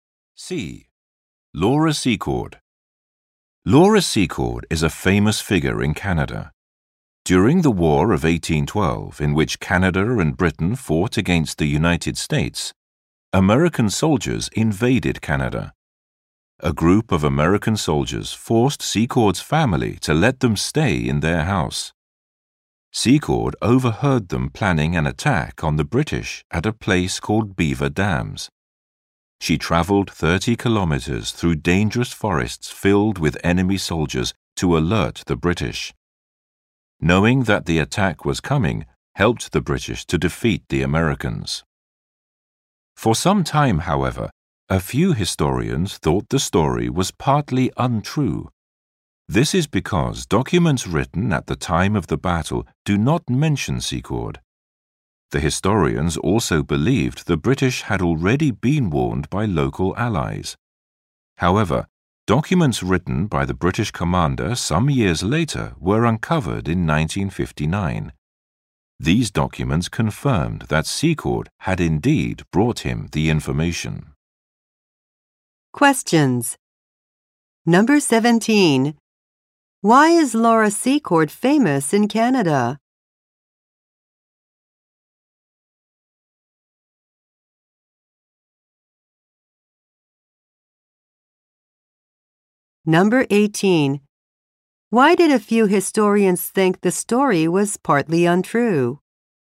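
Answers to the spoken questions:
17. She warned the British about an American attack during the War of 1812.
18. Documents written at the time of the battle do not mention her.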